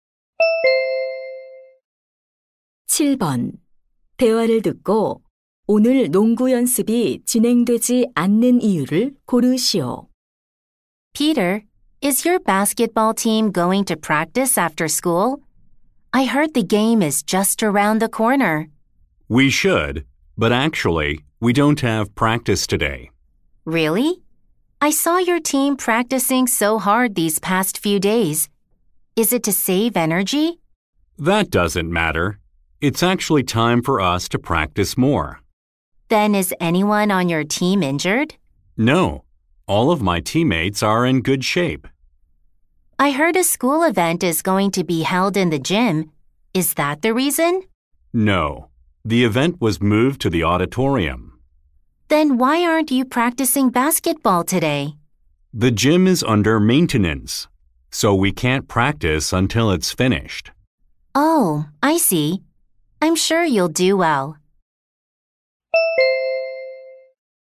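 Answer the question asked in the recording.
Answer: 체육관이 보수 공사 중이라서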